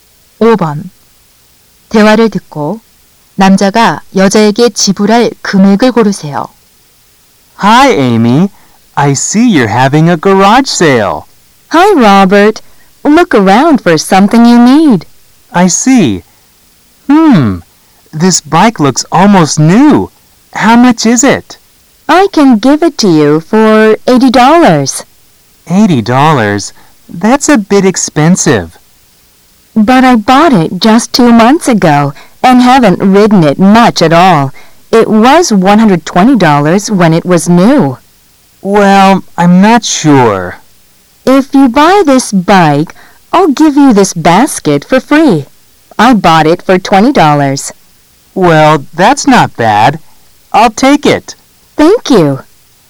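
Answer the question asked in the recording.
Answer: 80달러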